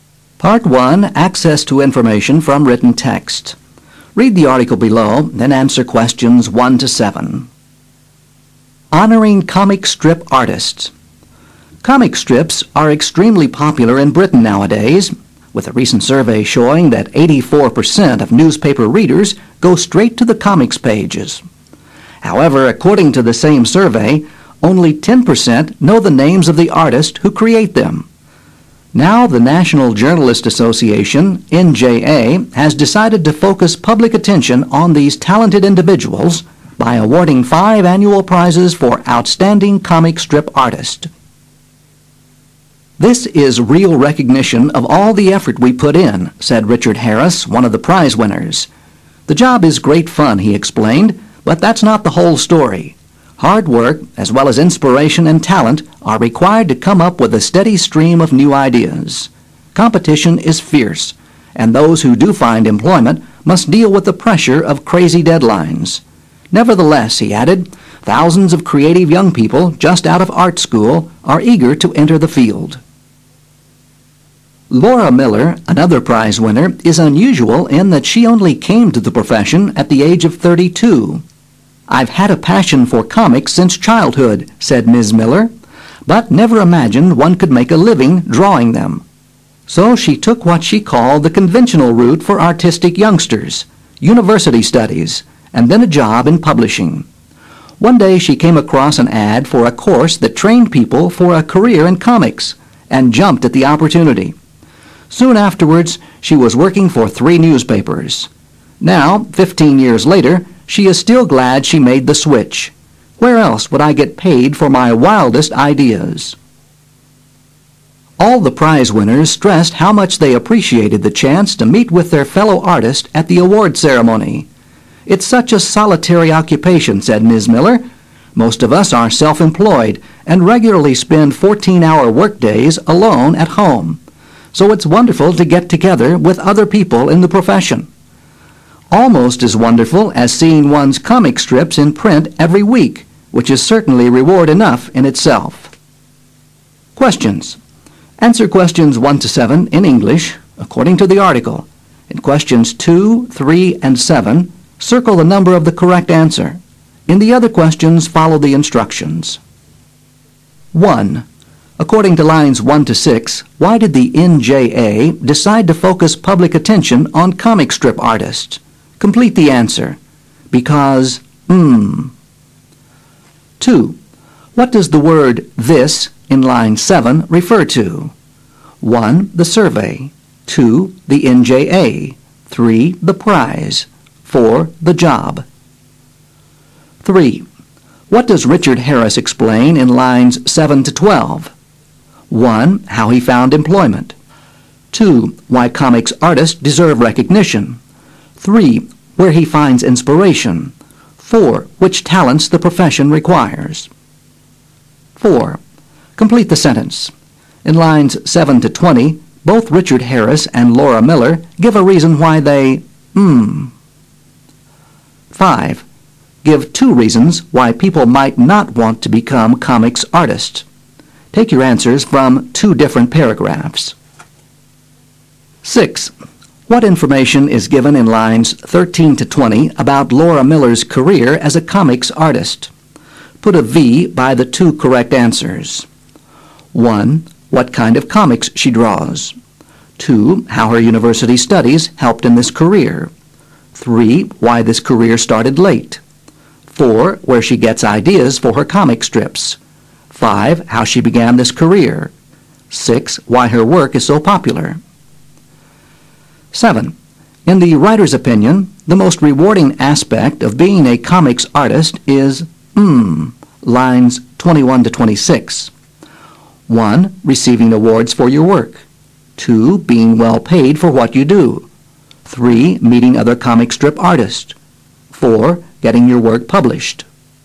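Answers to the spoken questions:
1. Because only 10% of readers know the names of the artists who create comic strips
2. 3: The prize
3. 2: Why comics artists deserve recognition
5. Competition is fierce and deadlines are crazy; the work is solitary, with long workdays alone at home
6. 3: Why this career started late; 5: How she began this career
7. 4: Getting your work published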